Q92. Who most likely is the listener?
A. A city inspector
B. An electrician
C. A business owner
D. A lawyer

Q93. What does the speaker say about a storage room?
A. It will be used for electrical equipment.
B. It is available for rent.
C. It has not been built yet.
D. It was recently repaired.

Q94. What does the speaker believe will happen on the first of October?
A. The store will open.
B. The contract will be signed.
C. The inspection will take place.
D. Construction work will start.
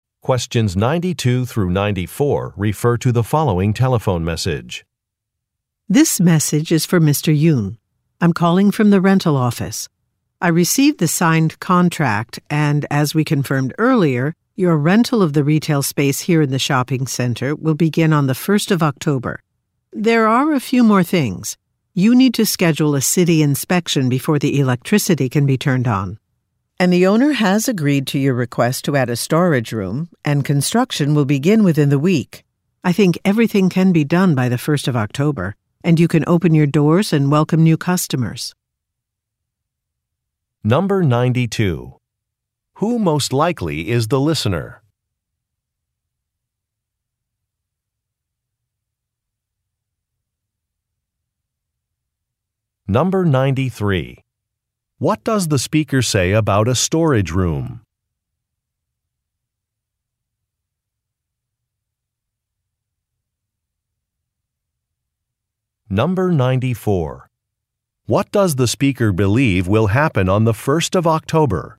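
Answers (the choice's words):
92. A business owner
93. It has not been built yet.
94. The store will open.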